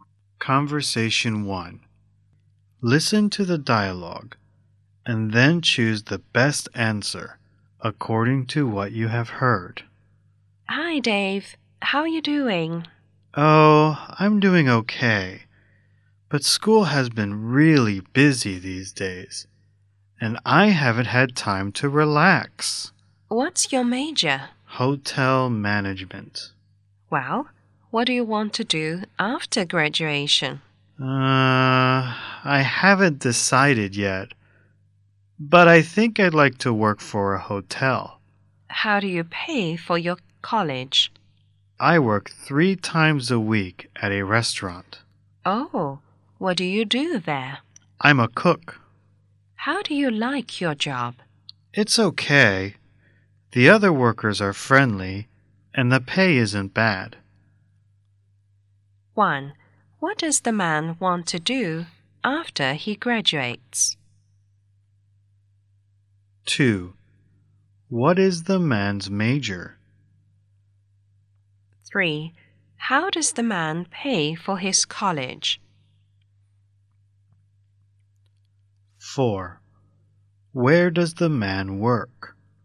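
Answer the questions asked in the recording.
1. Work for a hotel
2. Hotel management
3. He works three times a week at a restaurant
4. At a restaurant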